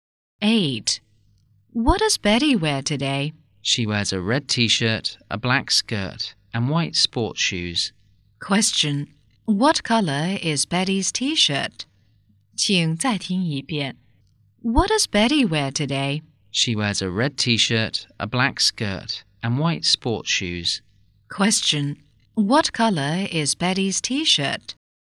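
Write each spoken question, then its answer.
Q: Question. What color is Betty's t-shirt?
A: Red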